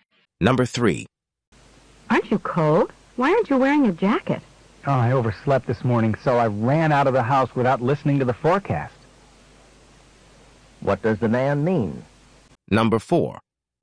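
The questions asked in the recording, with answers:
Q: What does the man mean?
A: He didn't know it would be cold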